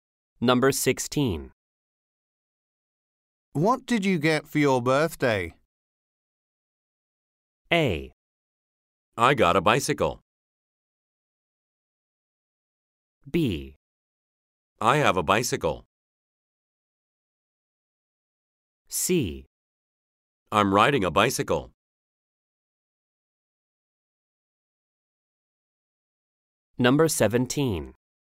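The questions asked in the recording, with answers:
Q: What did you get for your birthday?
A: A: I got a bicycle.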